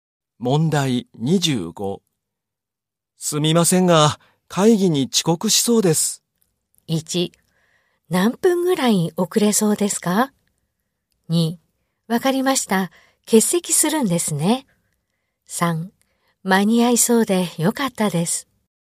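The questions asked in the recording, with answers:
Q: すみませんが、会議に遅刻しそうです。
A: 1: 何分ぐらい遅れそうですか?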